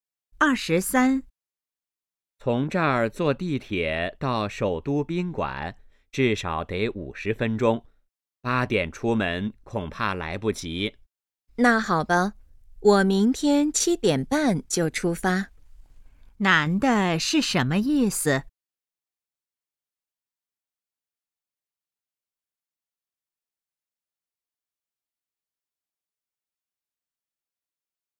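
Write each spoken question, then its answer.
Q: 男的是什么意思?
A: 明天7点半出发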